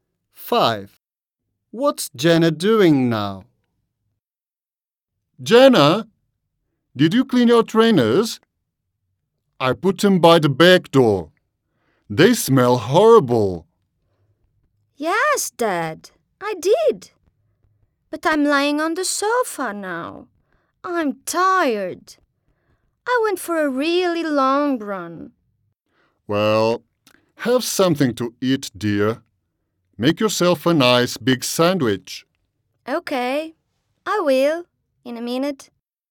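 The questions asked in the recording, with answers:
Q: What's Jenna doing now?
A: lying on the sofa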